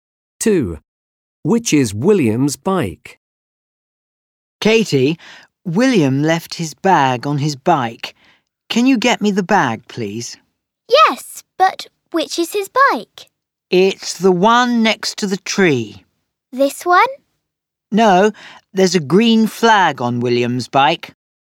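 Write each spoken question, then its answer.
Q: Which is William's bike?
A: The one with a green flag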